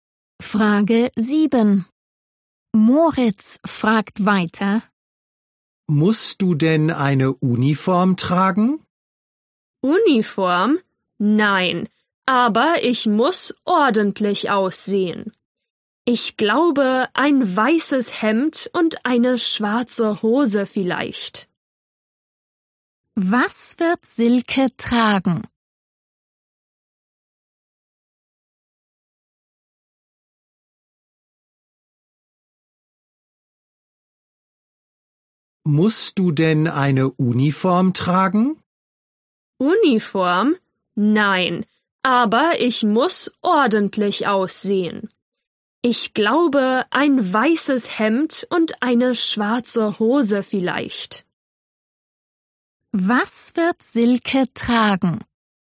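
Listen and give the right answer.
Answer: Ein weißes Hemd und eine schwarze Hose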